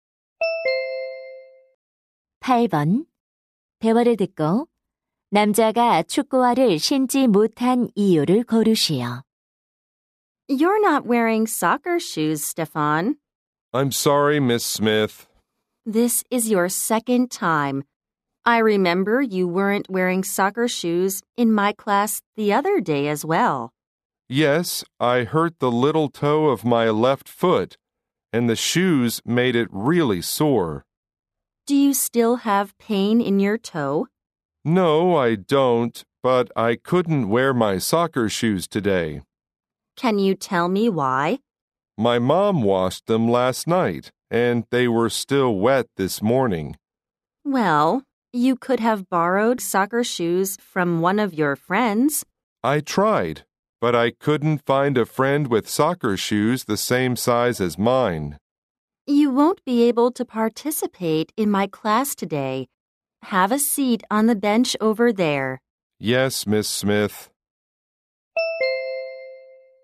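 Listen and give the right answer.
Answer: 엄마가 빨아서 축구화가 아직 젖어 있었기 때문에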